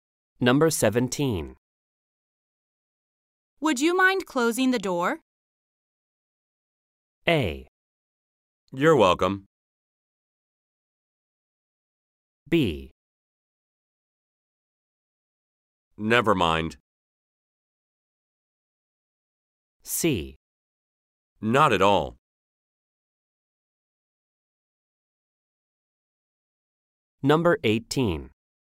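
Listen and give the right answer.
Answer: C: Not at all.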